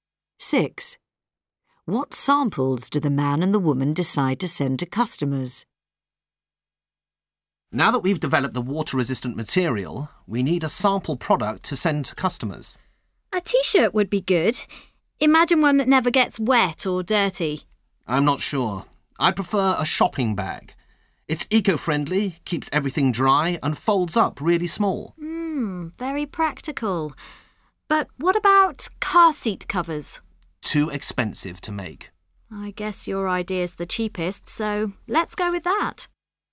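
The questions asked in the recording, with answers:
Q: What samples do the man and the woman decide to send to customers?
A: Shopping bags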